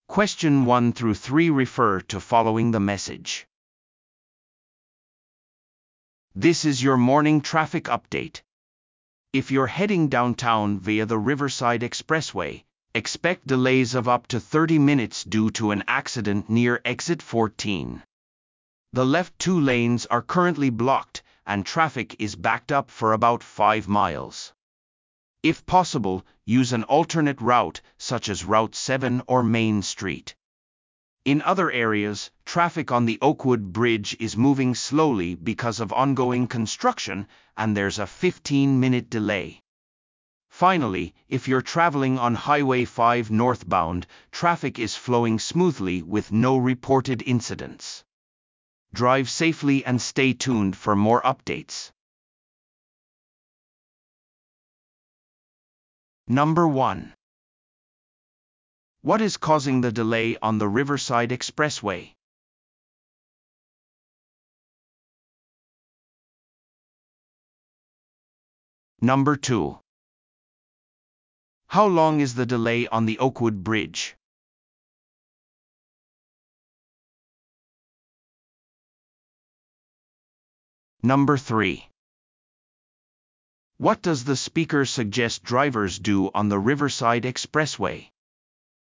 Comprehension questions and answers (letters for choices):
Listen to the audio below and answer the questions.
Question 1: What is causing the delay on the Riverside Expressway?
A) 工事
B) 交通量の多さ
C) 事故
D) 道路封鎖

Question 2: How long is the delay on the Oakwood Bridge?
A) 10分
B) 15分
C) 20分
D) 30分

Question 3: What does the speaker suggest drivers do on the Riverside Expressway?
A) 代替ルートを使用する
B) 車線が空くまで待つ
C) ルート7の通行を避ける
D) 塞がれている車線を通る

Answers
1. C
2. B
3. A

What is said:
"This is your morning traffic update. If you're heading downtown via the Riverside Expressway, expect delays of up to 30 minutes due to an accident near Exit 14. The left two lanes are currently blocked, and traffic is backed up for about 5 miles. If possible, use an alternate route, such as Route 7 or Main Street. In other areas, traffic on the Oakwood Bridge is moving slowly because of ongoing construction, and there's a 15-minute delay. Finally, if you're traveling on Highway 5 northbound, traffic is flowing smoothly with no reported incidents. Drive safely and stay tuned for more updates."